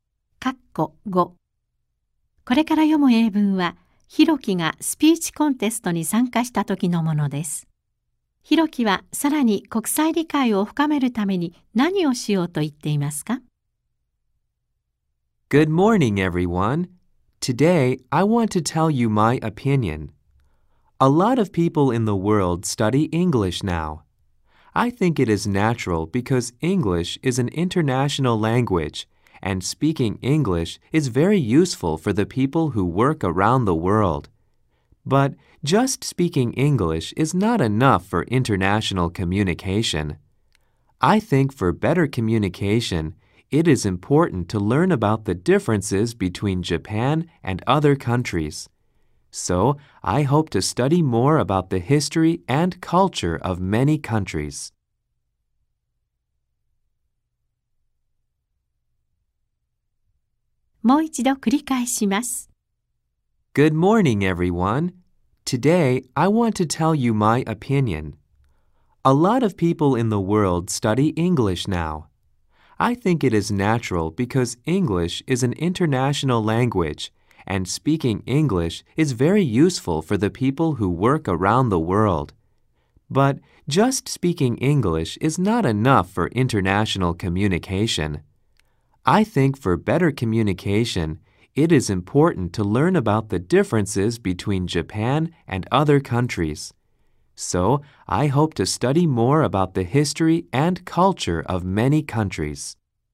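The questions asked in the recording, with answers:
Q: ヒロキはさらに国際理解を深めるために何をしようと言っていますか?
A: 多くの国の歴史や文化についてもっと学ぶ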